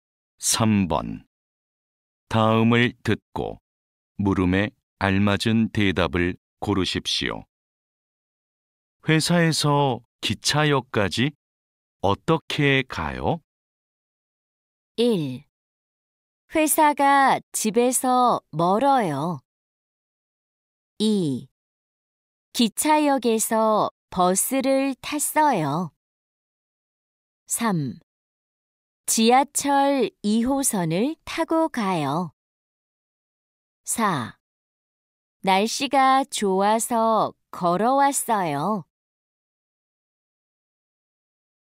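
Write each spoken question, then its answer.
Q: 회사에서 기차역까지 어떻게 가요?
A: 3: 지하철 2호선을 타고 가요.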